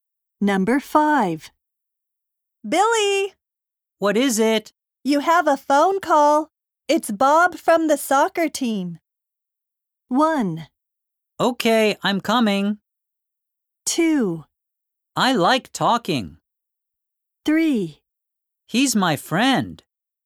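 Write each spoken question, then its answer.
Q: You have a phone call. It's Bob from the soccer team.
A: 1: Okay, I'm coming.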